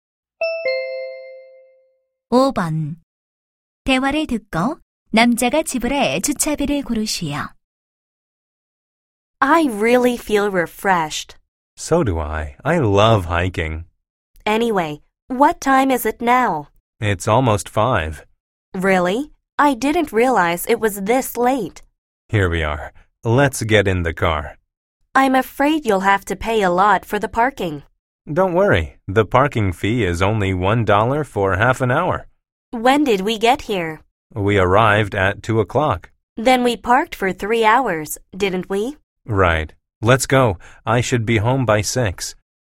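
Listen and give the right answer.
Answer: 6달러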